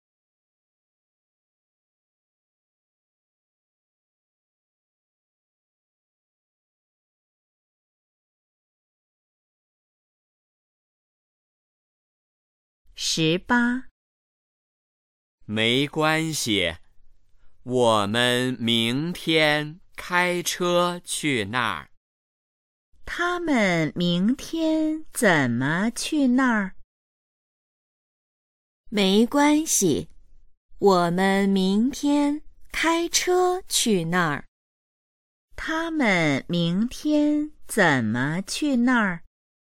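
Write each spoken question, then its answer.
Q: 他们明天怎么去那儿?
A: 开车去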